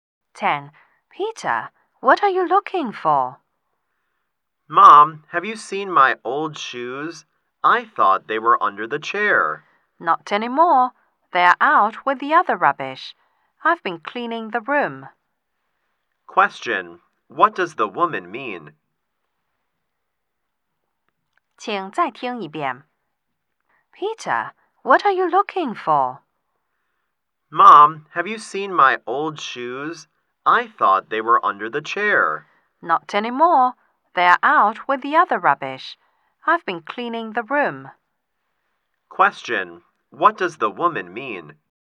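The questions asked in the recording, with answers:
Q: Question. What does the woman mean?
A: She threw the old shoes away with the rubbish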